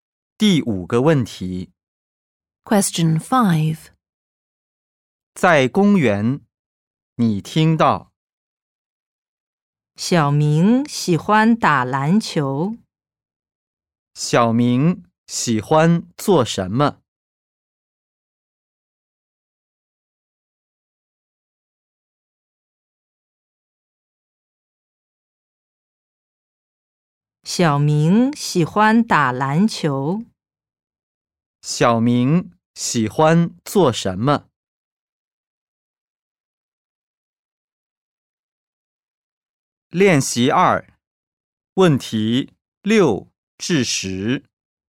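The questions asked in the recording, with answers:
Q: 小明喜欢做什么?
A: 打篮球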